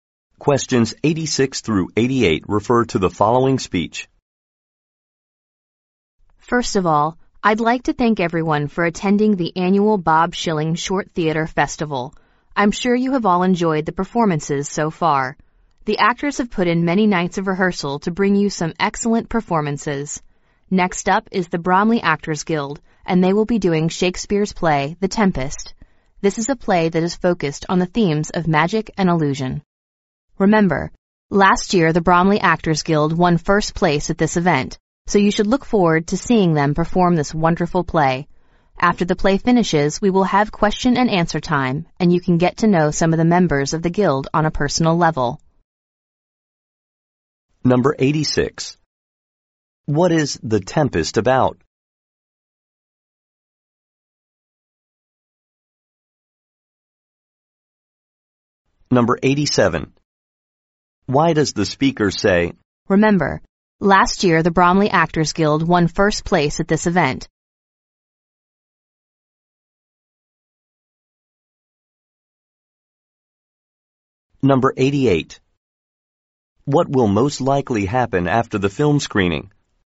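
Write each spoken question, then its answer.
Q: What is The Tempest about?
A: Magic and illusion

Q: What will most likely happen after the film screening?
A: A question and answer session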